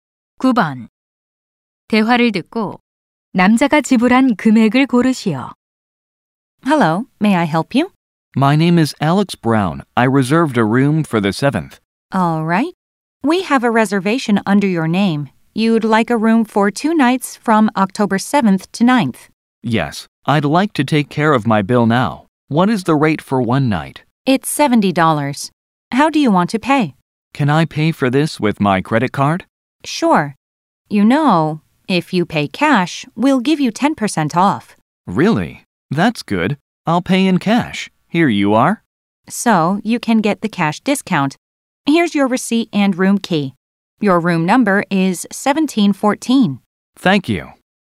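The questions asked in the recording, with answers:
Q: 대화를 듣고 남자가 지불한 금액을 고르시오.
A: 126달러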